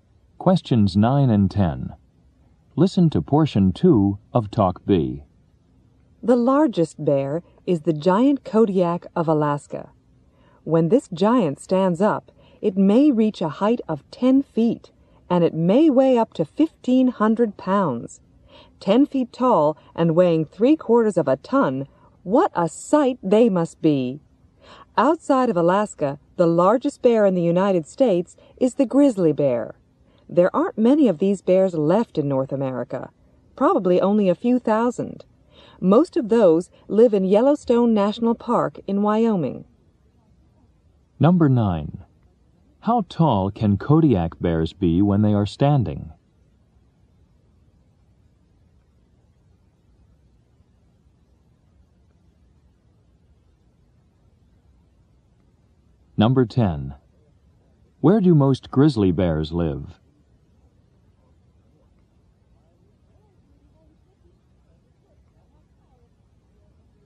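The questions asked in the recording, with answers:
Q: How tall can Kodiak bears be when they are standing?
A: Up to 10 feet

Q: Where do most grizzly bears live?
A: In Yellowstone National Park in Wyoming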